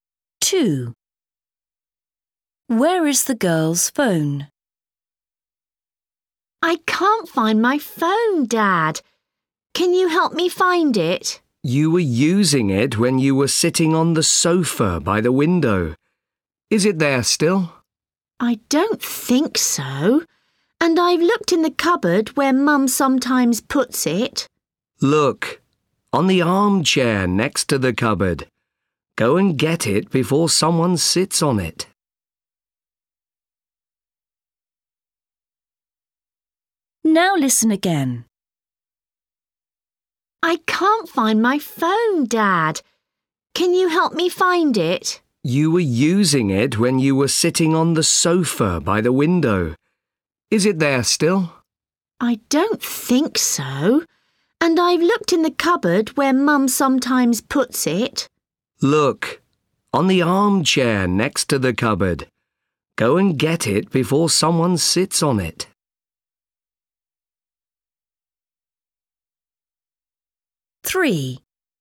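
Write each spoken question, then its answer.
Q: Where is the girl's phone?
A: on the armchair next to the cupboard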